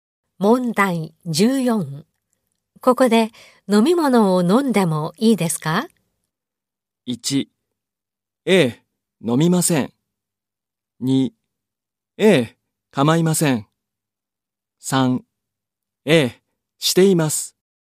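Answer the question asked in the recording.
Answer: 2: ええ、構いません。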